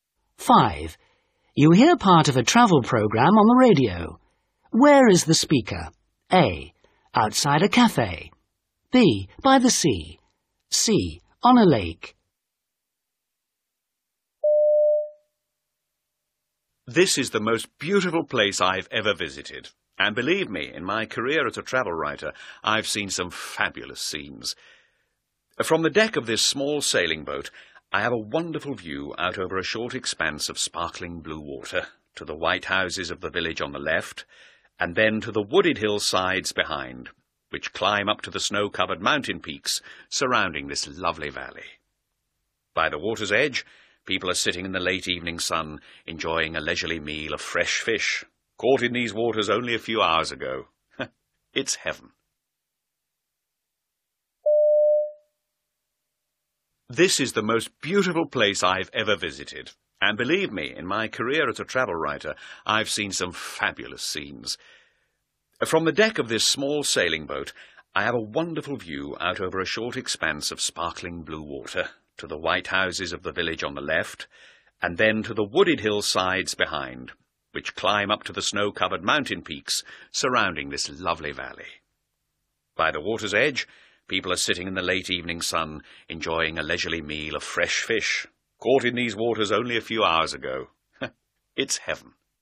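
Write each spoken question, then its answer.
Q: Where is the speaker?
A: C: On a lake.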